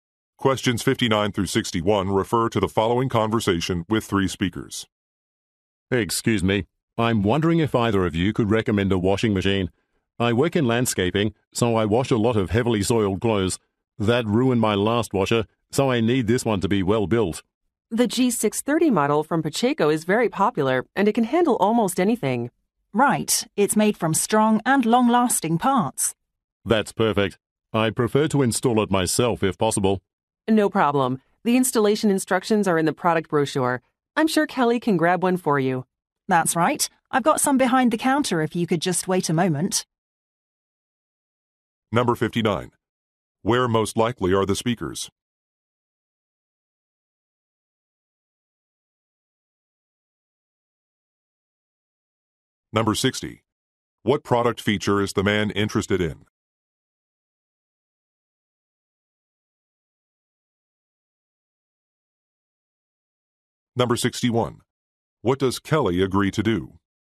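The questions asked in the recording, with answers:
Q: Where most likely are the speakers?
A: In an appliance store

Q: What product feature is the man interested in?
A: Durability

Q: What does Kelly agree to do?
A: Get him a product brochure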